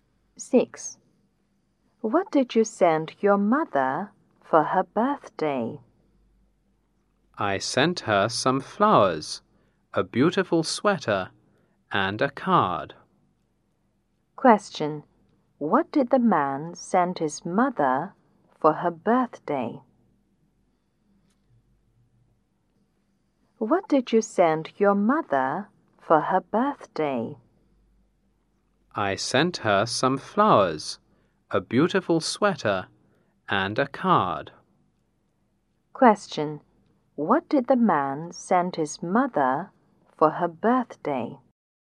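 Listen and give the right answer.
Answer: Some flowers, a beautiful sweater, and a card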